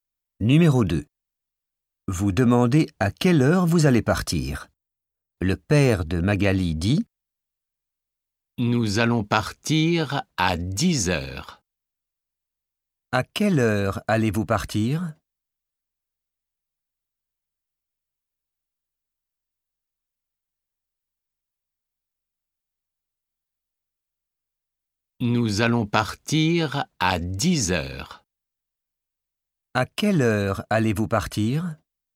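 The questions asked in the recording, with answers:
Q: À quelle heure allez-vous partir ?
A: à 10 heures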